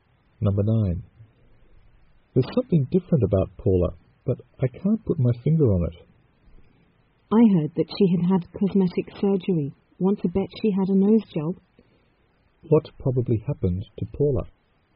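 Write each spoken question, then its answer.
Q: What probably happened to Paula?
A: She had a nose job (cosmetic surgery).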